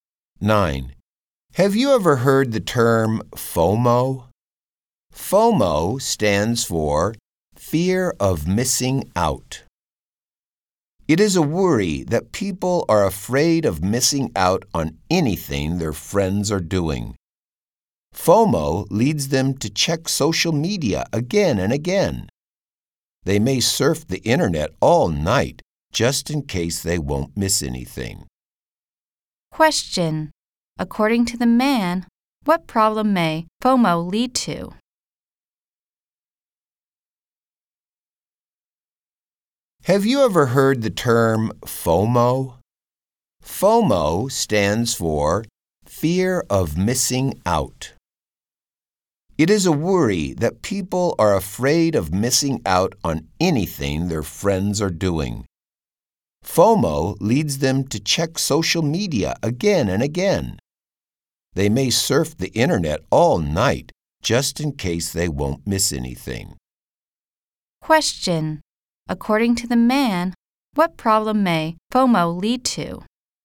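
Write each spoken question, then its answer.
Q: According to the man, what problem may FOMO lead to?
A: People may surf the internet all night.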